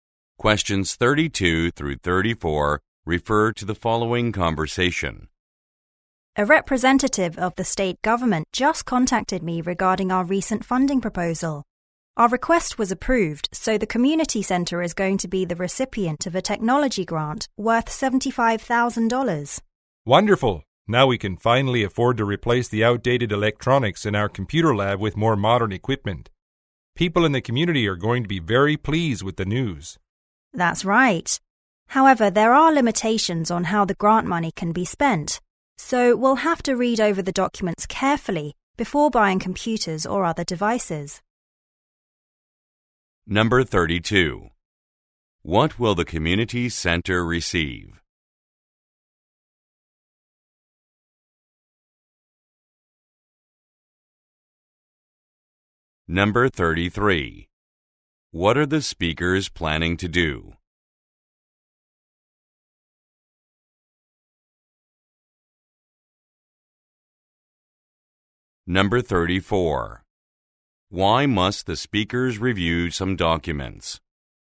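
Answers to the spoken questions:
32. A technology grant worth $75,000
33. Replace outdated electronics in the computer lab
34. There are limitations on how the grant money can be spent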